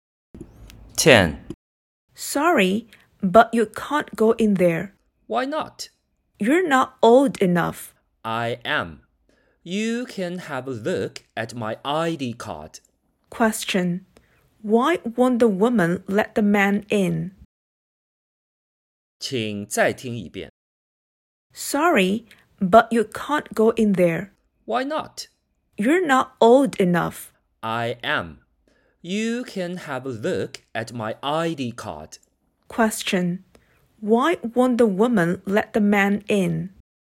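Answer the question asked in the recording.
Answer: She thinks he isn't old enough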